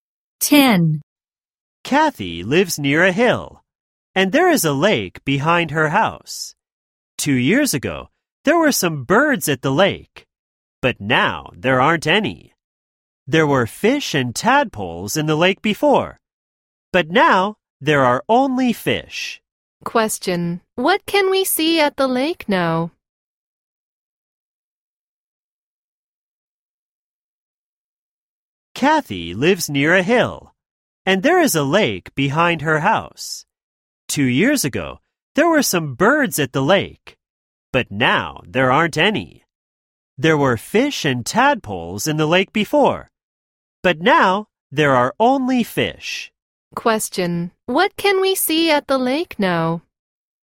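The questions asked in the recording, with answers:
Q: What can we see at the lake now?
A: Fish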